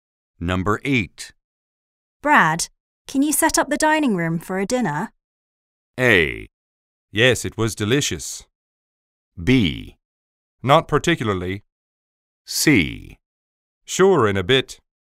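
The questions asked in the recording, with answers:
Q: Brad, can you set up the dining room for a dinner?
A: C: Sure, in a bit.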